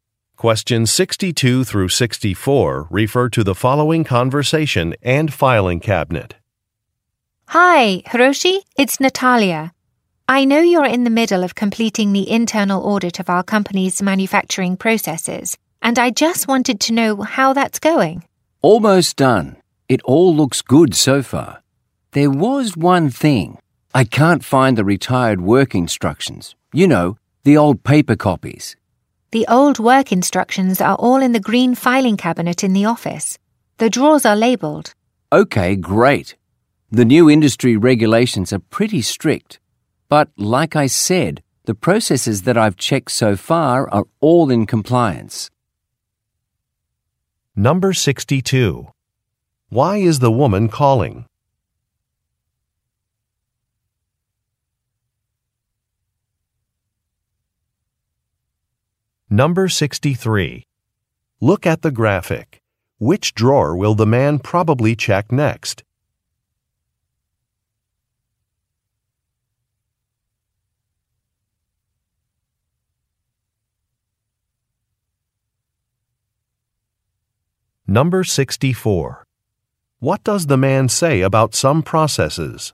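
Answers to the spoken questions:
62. To check how the internal audit is going
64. They comply with the new industry regulations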